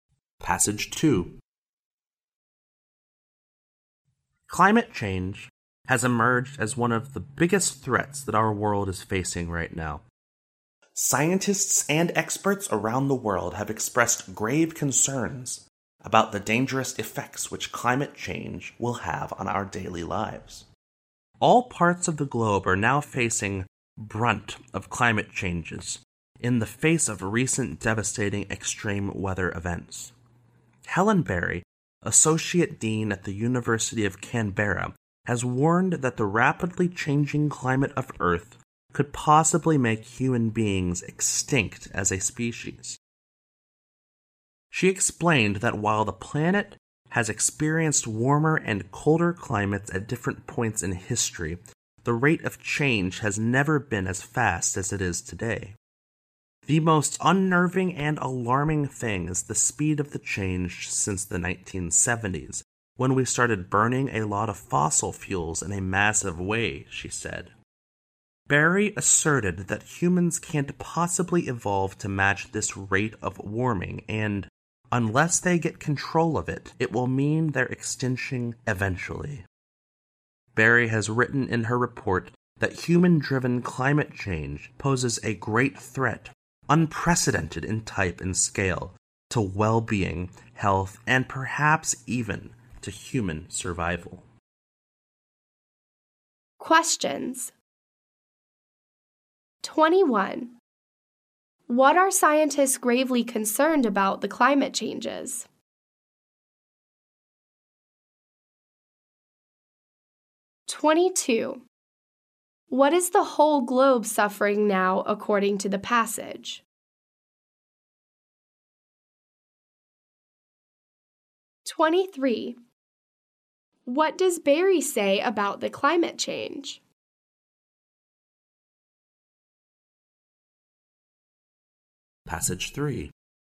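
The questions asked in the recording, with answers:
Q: What are scientists gravely concerned about the climate changes?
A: Its dangerous effects on our daily lives

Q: What is the whole globe suffering now, according to the passage?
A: Devastating extreme weather events

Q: What does Barry say about the climate change?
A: It changes too fast for humans to adapt and could lead to human extinction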